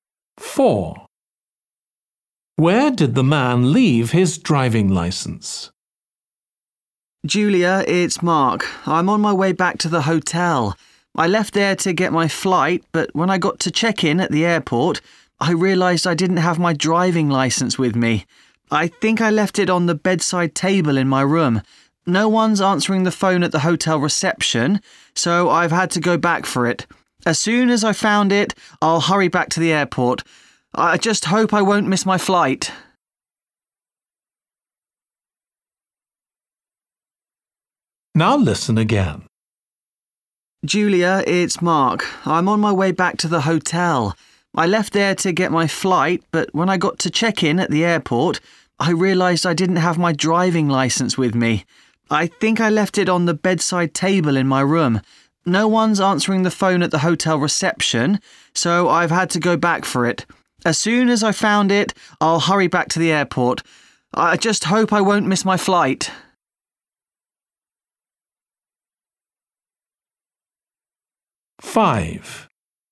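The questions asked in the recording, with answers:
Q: Where did the man leave his driving licence?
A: On the bedside table in his hotel room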